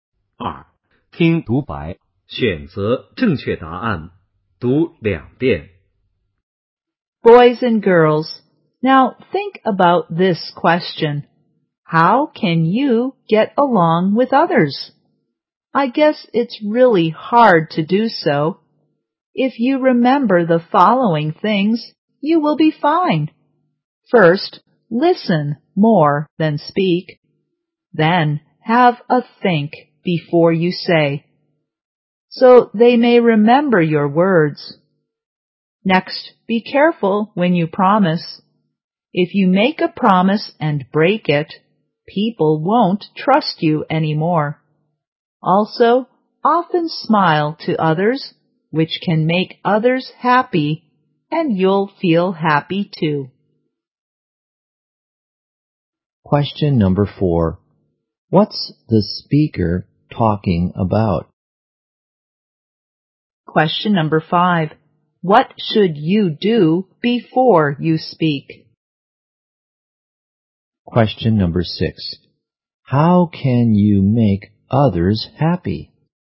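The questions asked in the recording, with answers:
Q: What's the speaker talking about?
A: How to get along with others

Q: What should you do before you speak?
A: Have a think

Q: How can you make others happy?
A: Often smile to others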